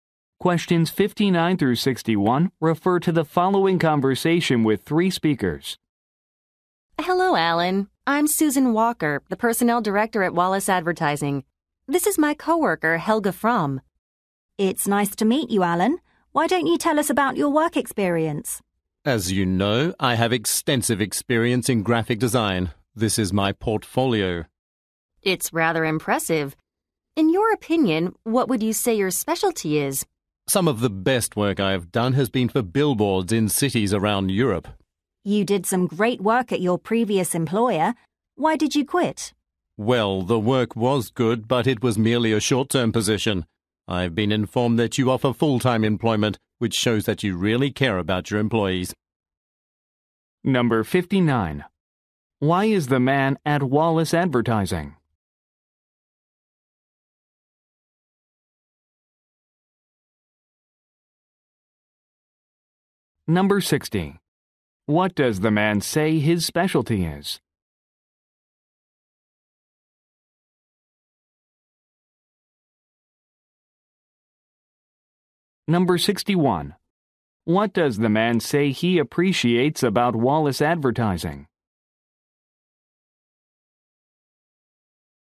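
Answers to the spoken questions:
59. For a job interview
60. Billboard design
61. It offers full-time employment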